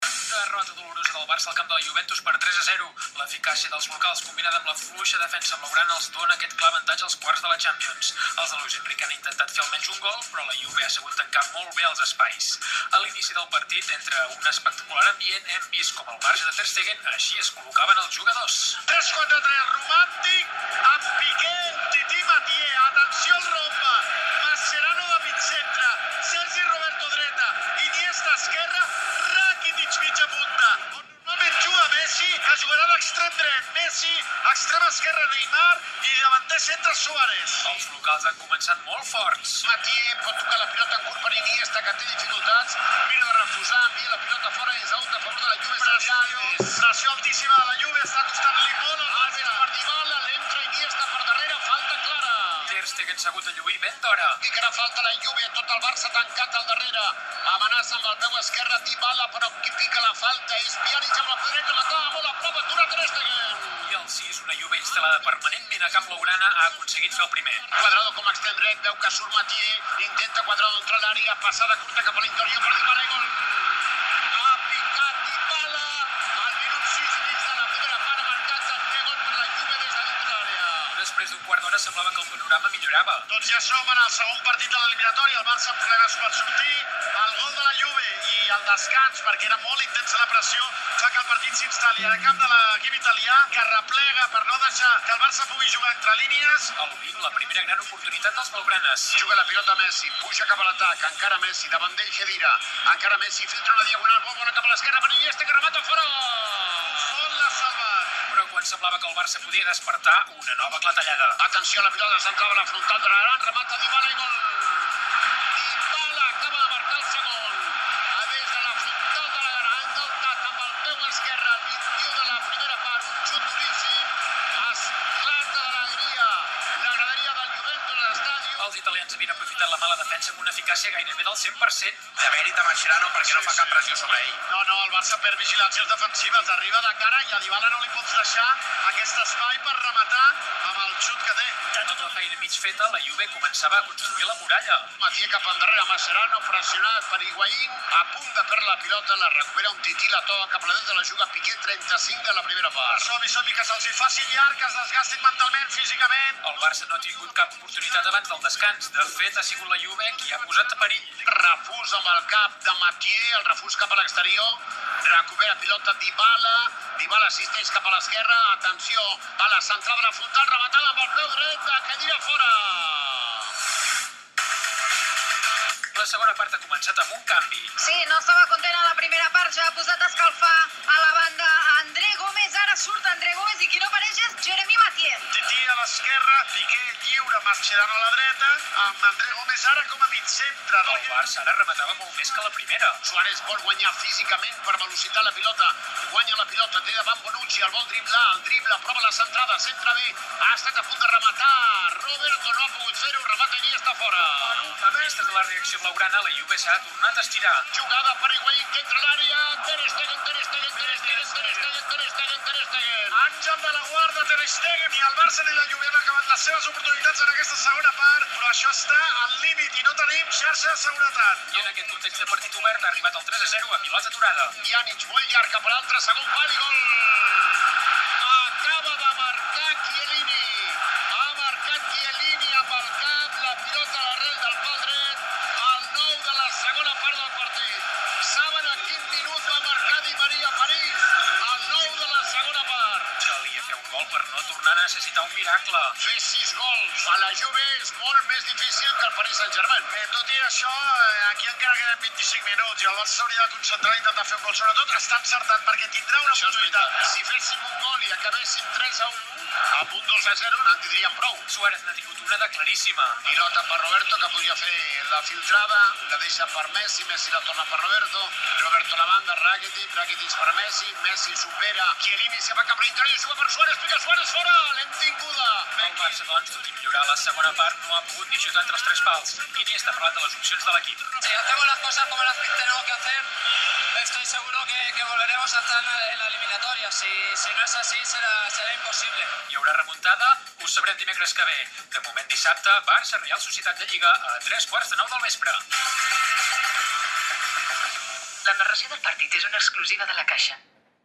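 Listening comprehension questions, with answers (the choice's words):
Escriviu en el requadre blanc la lletra que tinga l'opció correcta. Tingueu en compte que, per a cada qüestió plantejada, només hi ha una resposta correcta.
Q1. Quins són, segons l'analista, els motius de la derrota?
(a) L'eficàcia dels locals i la fluixa defensa blaugrana.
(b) L'eficàcia del porter de la Juve, Bufón, i la motivació dels afeccionats.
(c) La poca inspiració dels davanters blaugranes i la mala sort.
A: L'eficàcia dels locals i la fluixa defensa blaugrana.

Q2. Quina figura formen, segons el locutor, Mascherano, Sergi Roberto, Iniesta i Rakitij?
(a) Un quadrat.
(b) Un rombe.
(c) Un paral·lelogram.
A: Un rombe.

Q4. Què ha hagut de fer Der Stegen tan bon punt començava el partit?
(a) Recollir un enciam que havien llençat al camp.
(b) Mamprendre els defensors del Barça.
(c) Demostrar les seves habilitats entre els tres pals.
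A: Demostrar les seves habilitats entre els tres pals.

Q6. De qui és la passada i qui remata al minut 20?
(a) passada d'Iniesta, remata Messi.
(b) Passada de Mascherano, rematada de Messi.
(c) Passada de Messi, rematada d'iniesta.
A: Passada de Messi, rematada d'iniesta.

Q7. Què vol dir amb "una nova clatellada"?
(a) Que al Barça li xiulen un orsai en una molt bona ocasió de gol.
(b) Que li treuen targeta a un jugador del barça.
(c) Que la Juventus torna a marcar.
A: Que la Juventus torna a marcar.

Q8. Què fa la Juve després d'haver marcat?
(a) Augmentar l'ofensiva.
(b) Tancar-se en defensa.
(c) Comença a fer faltes més severes.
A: Tancar-se en defensa.

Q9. Com no es marca el tercer gol de la Juve?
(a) De cap.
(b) A baló aturat.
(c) Des de fora de l'àrea.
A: Des de fora de l'àrea.

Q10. Quan queden 25 minuts per al final, què suggereix el locutor que hauria de fer el Barça?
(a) Jugar amb tres davanters.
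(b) No descuidar la defensa.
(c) Centrar-se a fer diana.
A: Centrar-se a fer diana.

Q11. A quina hora és el proper Barça – Reial Societat de Lliga?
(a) A les 21:45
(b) A les 20:45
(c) A les 21:15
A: A les 20:45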